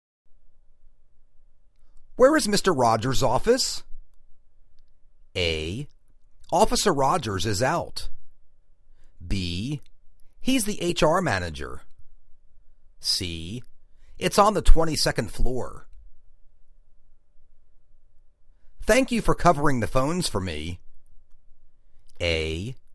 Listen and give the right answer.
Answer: It's on the 22nd floor.